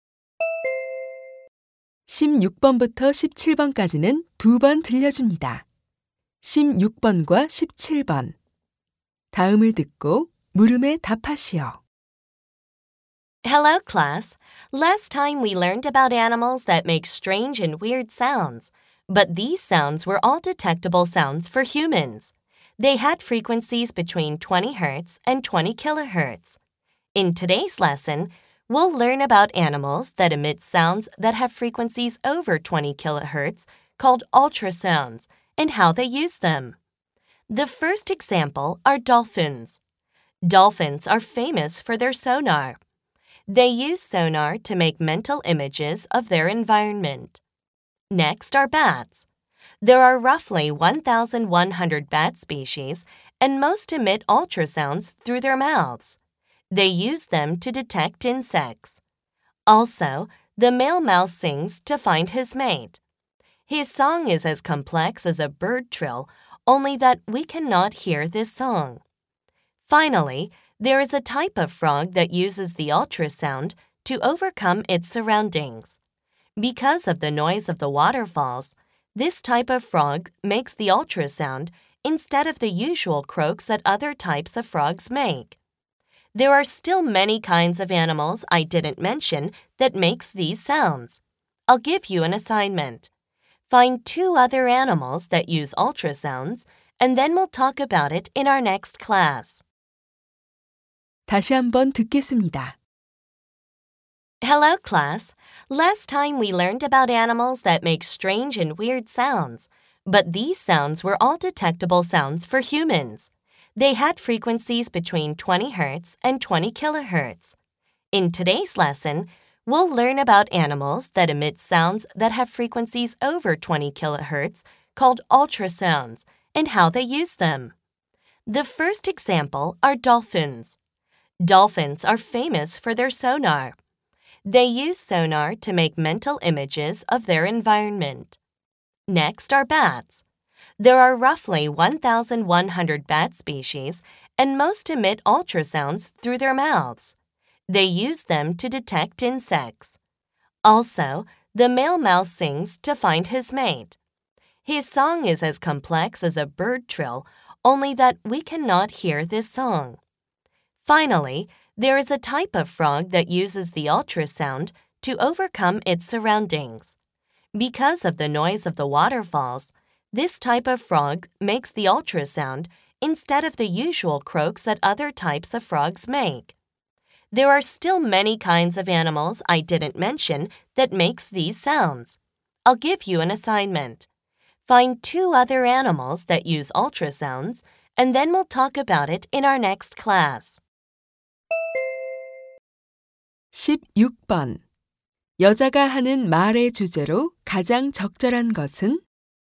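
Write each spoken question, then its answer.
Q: 여자가 하는 말의 주제로 가장 적절한 것은?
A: 동물들이 초음파를 사용하는 방법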